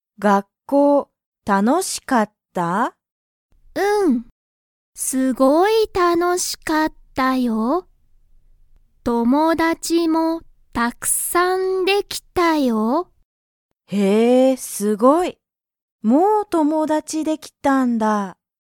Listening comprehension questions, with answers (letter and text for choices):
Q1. リサは____がたくさんできた。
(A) 学校(がっこう)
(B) 車(くるま)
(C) 友達(ともだち)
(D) 家(いえ)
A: (C) 友達(ともだち)

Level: Level 1